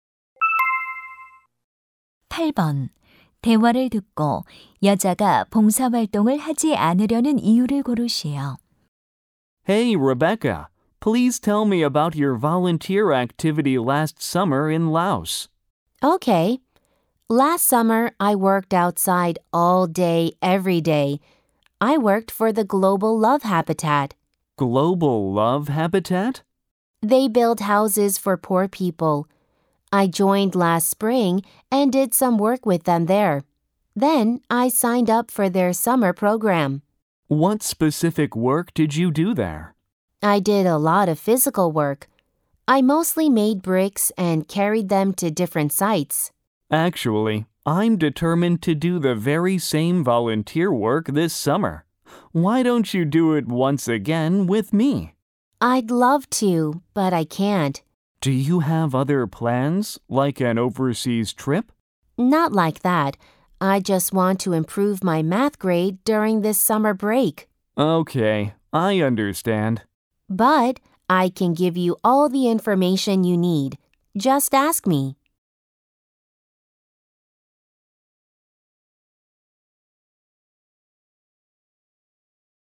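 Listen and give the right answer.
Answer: 여름 방학 동안 수학 성적을 올리고 싶어서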